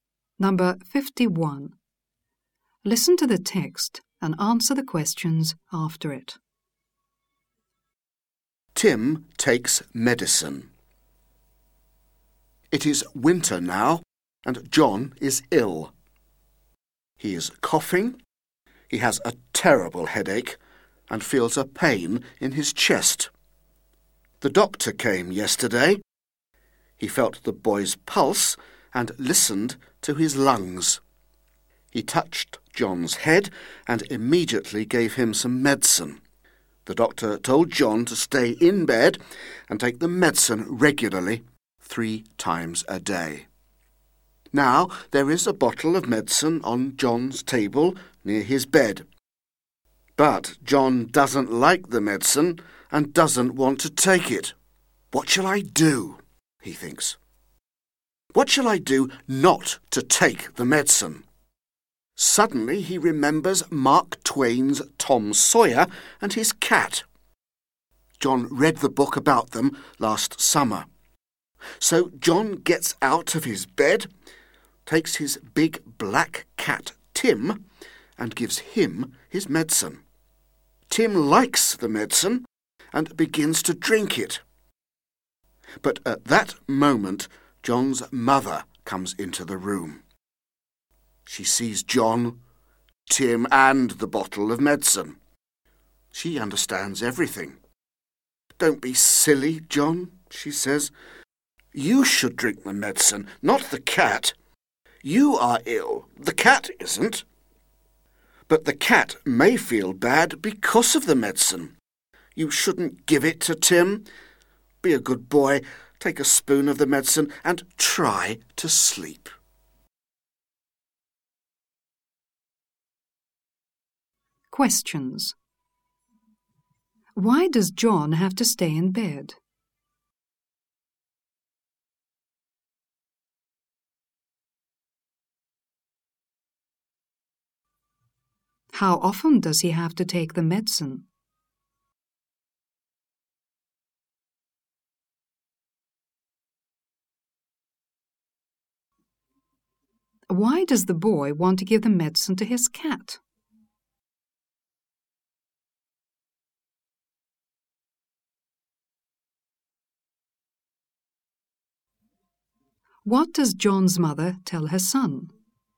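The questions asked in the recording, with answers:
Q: Why does John have to stay in bed?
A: Because he is ill.

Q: How often does he have to take the medicine?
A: 3 times a day.

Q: Why does the boy want to give the medicine to his cat?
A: Because he doesn't like the medicine and doesn't want to take it.

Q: What does John's mother tell her son?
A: Not to be silly, to take the medicine himself and try to sleep.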